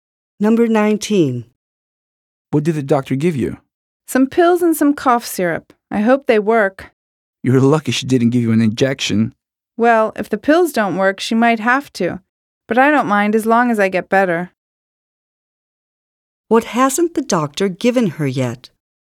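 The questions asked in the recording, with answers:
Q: What hasn't the doctor given her yet?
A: An injection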